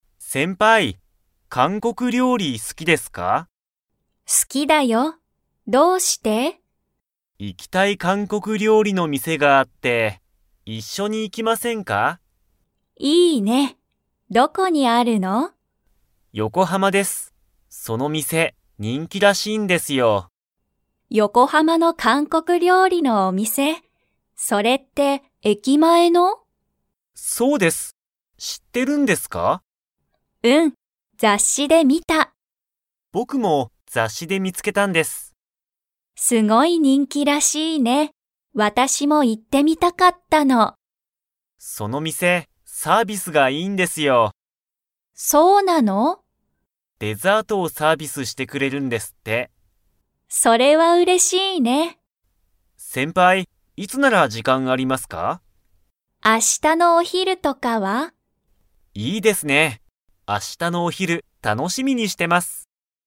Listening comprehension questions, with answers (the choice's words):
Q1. 韓国かんこく料理りょうりの店みせは、どこにありますか?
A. ネット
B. 横浜よこはま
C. 駅えきの中なか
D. 雑誌ざっし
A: 横浜よこはま

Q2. 二人ふたりは、明日あした韓国かんこく料理りょうりのお店みせに 。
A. 行いく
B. 行いかない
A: 行いく

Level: Level 4